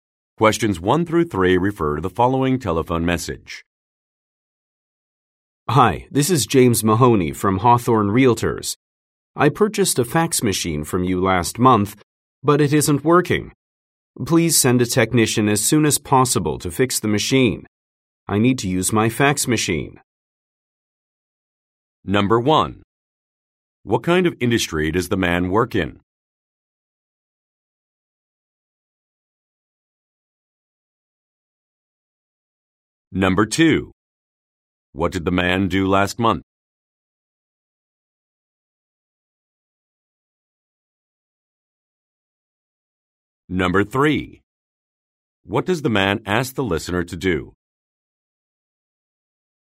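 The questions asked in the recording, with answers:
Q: What kind of industry does the man work in?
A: Real estate.

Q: What did the man do last month?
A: He bought a fax machine.

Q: What does the man ask the listener to do?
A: Send a technician to fix the machine.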